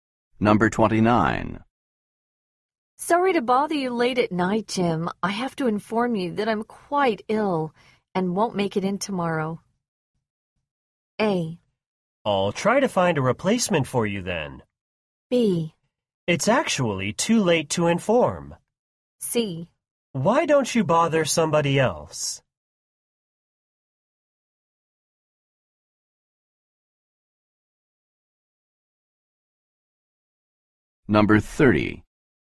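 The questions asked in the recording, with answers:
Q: I have to inform you that I'm quite ill and won't make it in tomorrow.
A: A: I'll try to find a replacement for you then.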